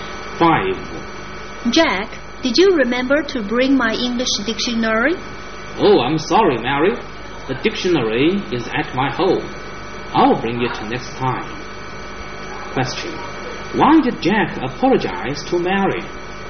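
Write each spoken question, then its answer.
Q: Why did Jack apologize to Mary?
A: He forgot to bring her English dictionary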